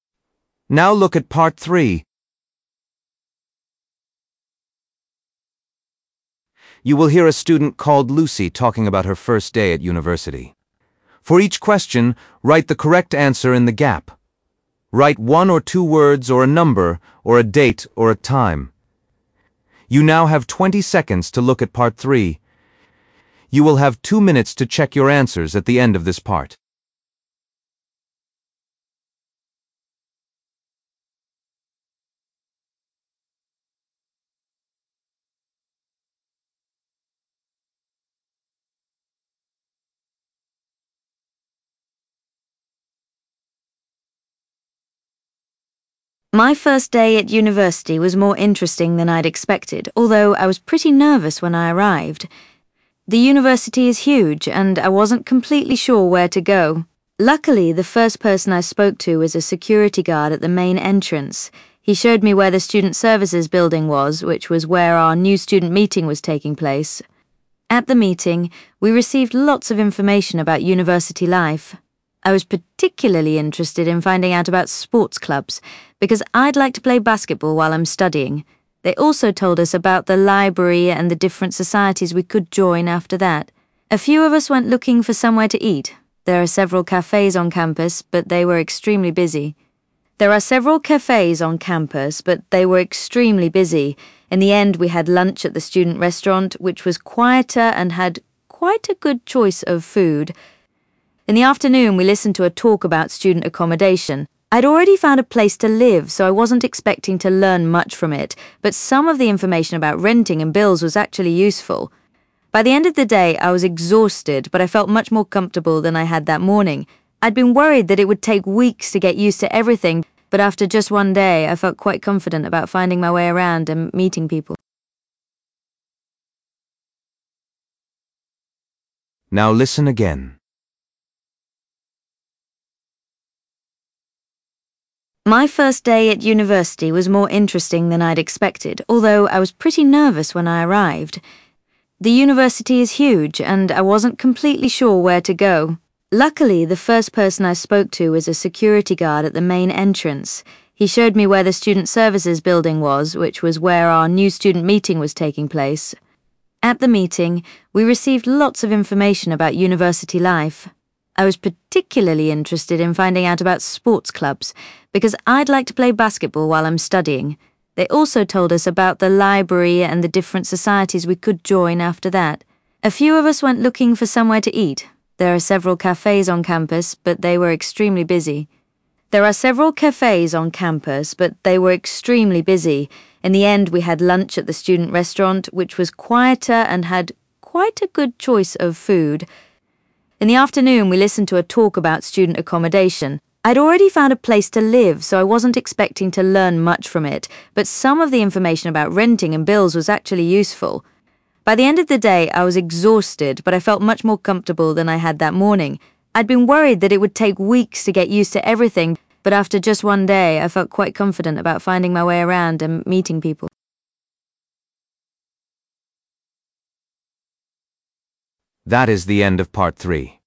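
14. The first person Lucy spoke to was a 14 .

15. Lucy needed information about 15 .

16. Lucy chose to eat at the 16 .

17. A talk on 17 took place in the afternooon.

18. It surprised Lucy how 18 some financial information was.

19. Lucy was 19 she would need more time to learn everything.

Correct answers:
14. security guard
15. sports clubs
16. student restaurant
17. student accommodation
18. useful
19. worried

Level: B1 Preliminary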